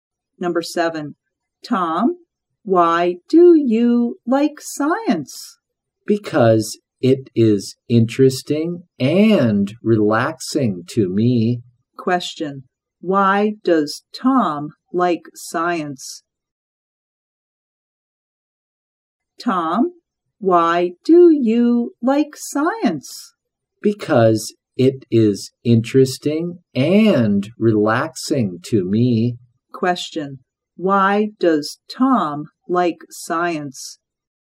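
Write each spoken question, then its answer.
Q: Why does Tom like science?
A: Because it is interesting and relaxing to him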